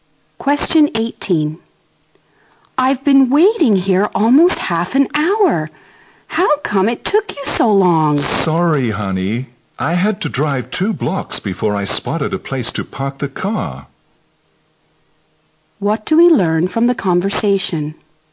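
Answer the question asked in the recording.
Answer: The man was late because it was hard to find a parking place.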